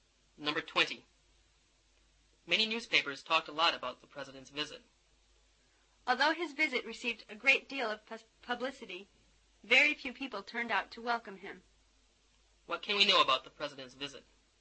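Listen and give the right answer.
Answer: Very few people turned out to welcome him despite the publicity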